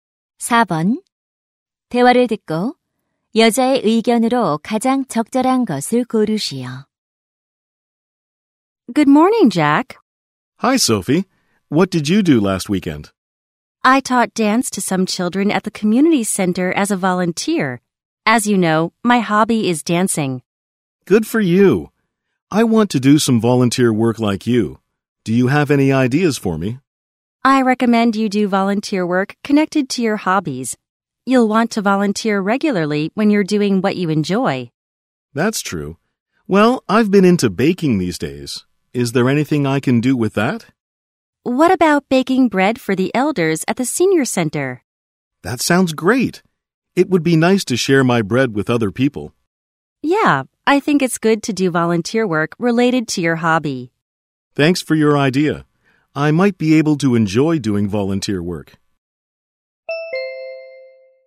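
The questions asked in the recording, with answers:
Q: 대화를 듣고 여자의 의견으로 가장 적절한 것을 고르시오.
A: 취미와 관련된 봉사활동을 하는 것이 좋다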